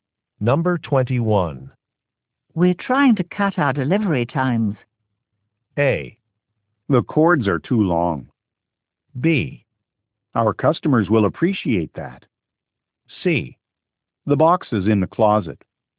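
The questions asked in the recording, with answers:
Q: We're trying to cut our delivery times.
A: B: Our customers will appreciate that.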